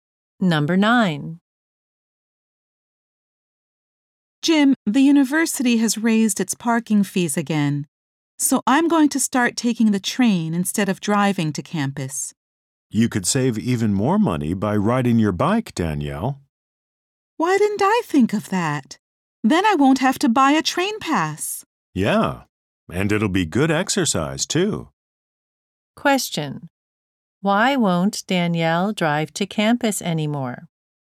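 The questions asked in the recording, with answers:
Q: Why won't Danielle drive to campus anymore?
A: The university raised its parking fees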